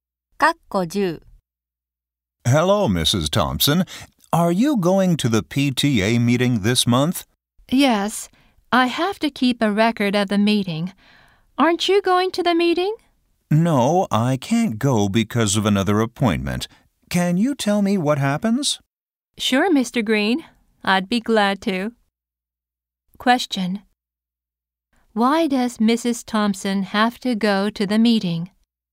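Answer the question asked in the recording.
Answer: She has to keep a record of the meeting.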